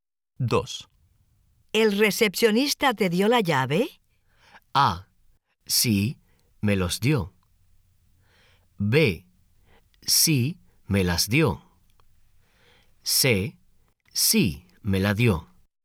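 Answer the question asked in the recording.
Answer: C: Sí, me la dio.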